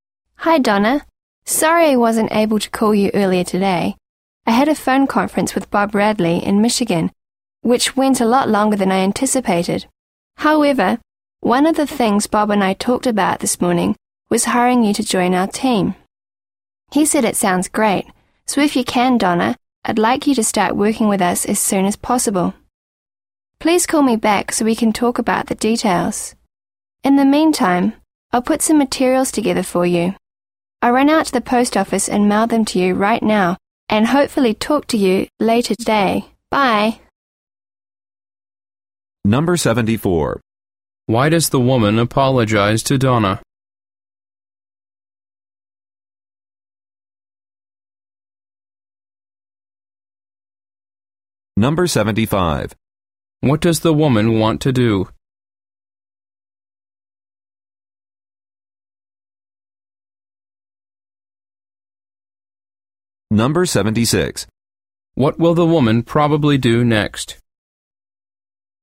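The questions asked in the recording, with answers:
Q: Why does the woman apologize to Donna?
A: She was not able to call Donna earlier because a phone conference ran long.

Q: What does the woman want to do?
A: Hire Donna to join her team as soon as possible.

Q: What will the woman probably do next?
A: Go to the post office to mail materials to Donna.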